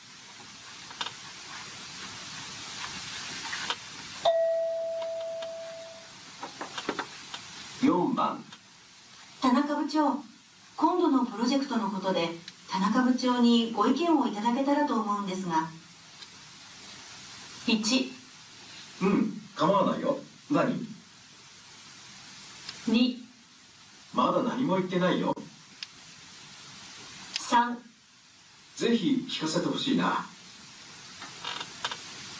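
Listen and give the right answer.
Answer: 1: うん、構わないよ。何?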